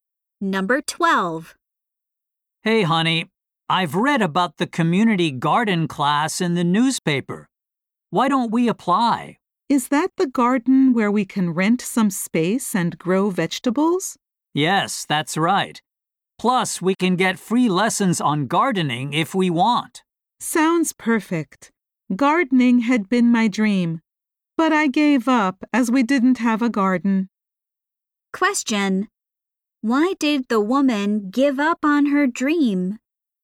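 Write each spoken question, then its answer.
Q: Why did the woman give up on her dream?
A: They didn't have a garden.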